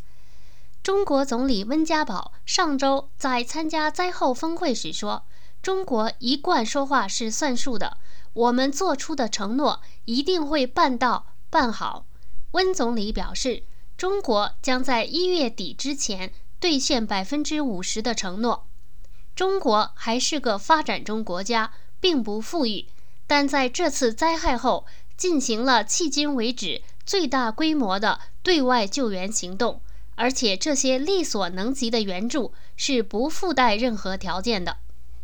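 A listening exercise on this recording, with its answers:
Please answer the following questions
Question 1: 中国总理温家宝在参加灾后峰会时说了什么?中国承诺的援助是否有附加条件?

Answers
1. 他说中国一贯说话算数,做出的承诺一定会办到办好,并将在一月底前兑现50%的承诺;援助不附带任何条件

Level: 3rd Year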